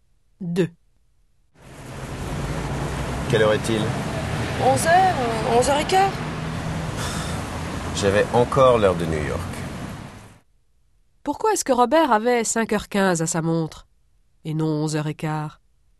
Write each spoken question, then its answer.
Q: Pourquoi est-ce que Robert avait 5h15 à sa montre et non 11h15?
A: Parce qu'il avait encore l'heure de New York.